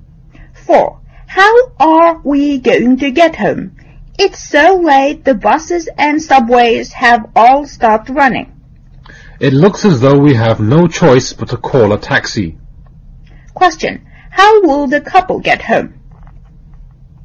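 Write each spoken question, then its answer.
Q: How will the couple get home?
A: By taxi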